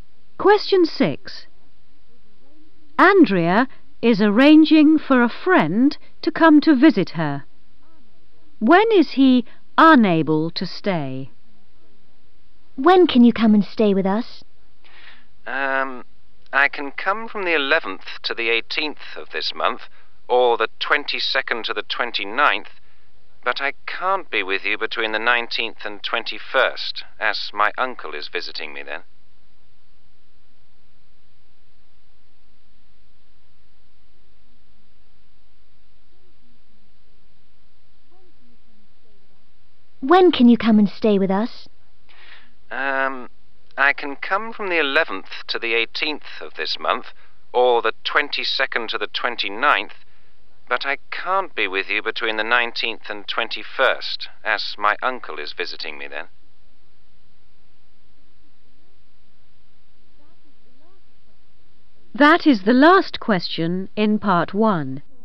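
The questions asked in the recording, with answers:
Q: When is he unable to stay?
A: between the 19th and 21st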